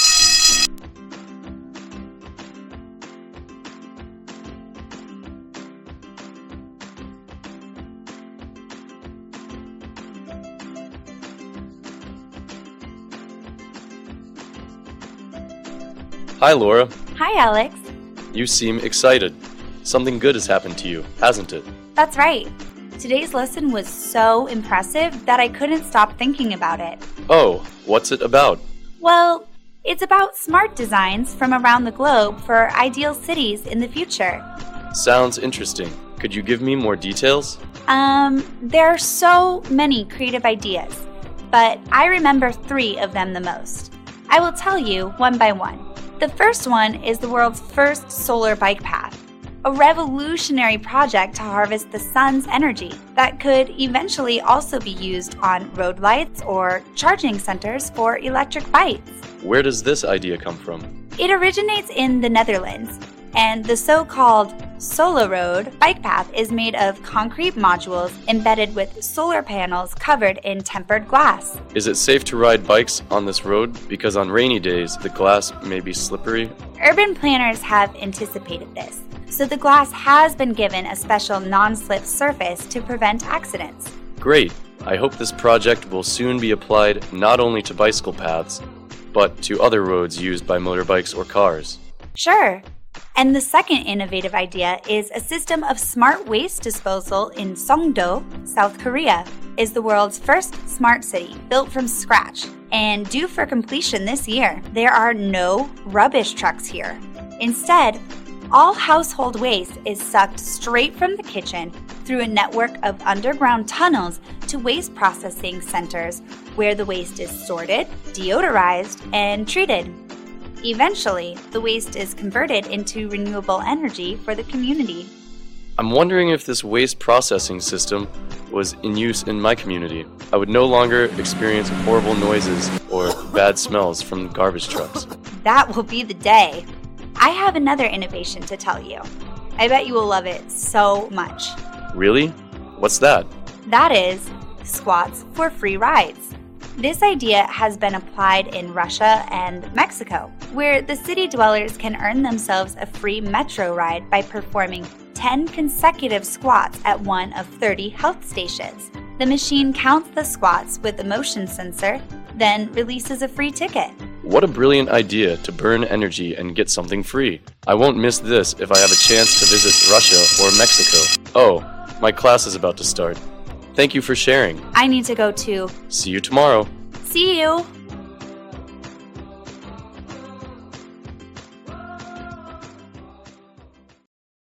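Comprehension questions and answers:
Task: Fill in the blanks.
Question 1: The Solar Bike Path project comes from ___________.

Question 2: The glass surface is ___________ to avoid accidents.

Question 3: Songdo's waste disposal system uses ___________ tunnels.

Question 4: In Russia and Mexico, people get a free metro ticket after doing ___________ squats.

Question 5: Waste in Songdo is converted into ___________ energy.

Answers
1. the Netherlands
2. non-slip
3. underground
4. 10
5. renewable

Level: lớp 11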